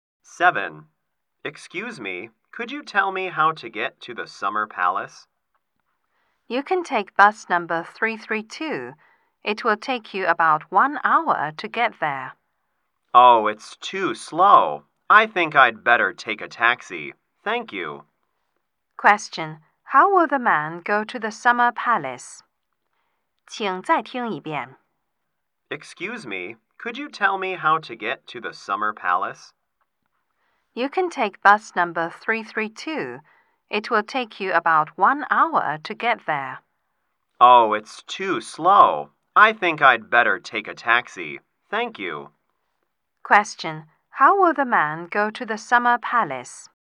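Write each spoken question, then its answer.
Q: How will the man go to the Summer Palace?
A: By taxi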